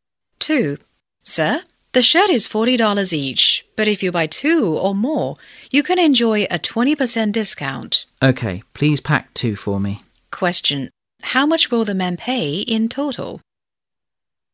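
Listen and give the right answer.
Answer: $64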